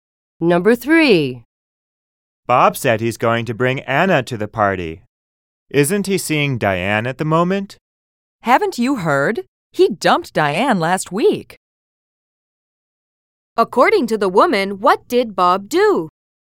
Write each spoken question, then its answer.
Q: According to the woman, what did Bob do?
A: The woman said that Bob dumped Diane, which means that he broke up with her.